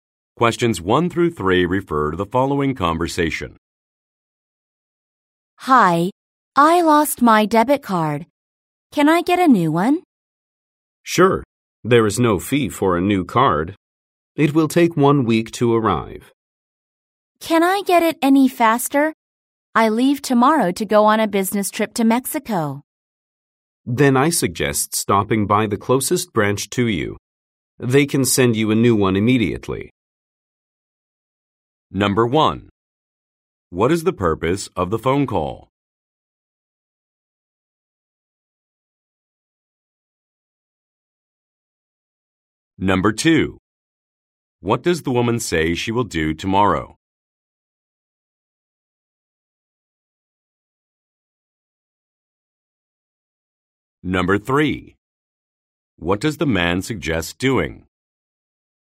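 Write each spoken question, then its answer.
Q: What is the purpose of the phone call?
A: To get a new debit card after losing one

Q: What does the woman say she will do tomorrow?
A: Go on a business trip to Mexico

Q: What does the man suggest doing?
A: Stopping by the closest branch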